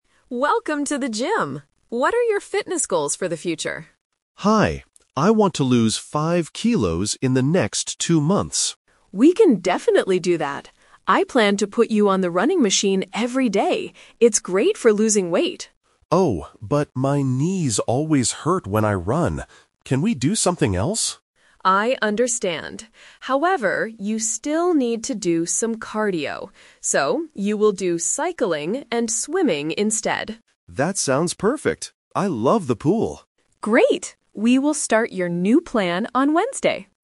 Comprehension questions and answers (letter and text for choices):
Listen to the conversation between a personal trainer and a new client. Choose the correct answer (A, B, or C) for each question.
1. What is the client's goal for the next two months?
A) To build big muscles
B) To run a marathon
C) To lose weight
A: C) To lose weight

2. What exercise will the client do to reach his goal?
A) Running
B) Cycling and swimming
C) Lifting weights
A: B) Cycling and swimming

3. Why doesn't the client want to run?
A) He thinks it is boring.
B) His knees hurt.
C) He is too tired.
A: B) His knees hurt.

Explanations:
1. The client clearly states his goal: "I want to lose five kilos." Building muscles (A) and running a marathon (B) are plausible fitness goals, but they are not mentioned in the audio.
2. The trainer says he planned to put the client on the running machine (The Trap). However, the client rejects this because of pain. The trainer uses "So" to introduce the final plan: "you will do cycling and swimming instead." Lifting weights is not mentioned.
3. The client explicitly explains his reason: "my knees always hurt when I run." Option A (boring) and Option C (too tired) are plausible reasons to avoid running, but they are not mentioned by the client.

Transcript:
Trainer: Welcome to the gym! What are your fitness goals for the future?
Client: Hi! I want to lose five kilos in the next two months.
Trainer: We can definitely do that. I planned to put you on the running machine every day. It's great for losing weight.
Client: Oh, but my knees always hurt when I run. Can we do something else?
Trainer: I understand. However, you still need to do some cardio. So, you will do cycling and swimming instead.
Client: That sounds perfect. I love the pool.
Trainer: Great. We will start your new plan on Wednesday!